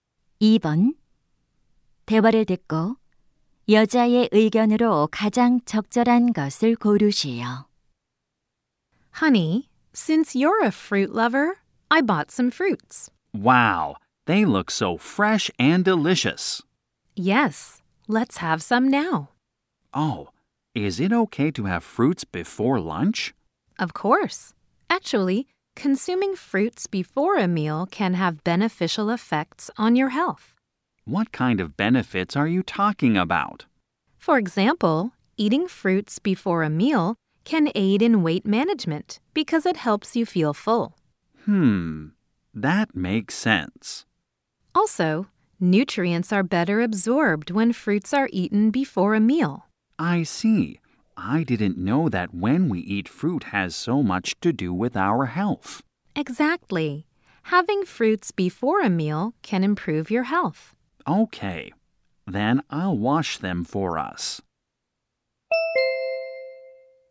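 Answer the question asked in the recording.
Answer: 식사 전에 과일을 먹으면 건강에 좋다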